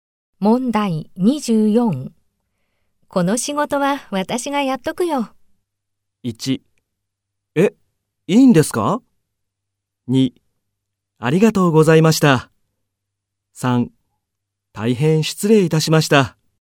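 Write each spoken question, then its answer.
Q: この仕事は私がやっとくよ。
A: 1: え、いいんですか?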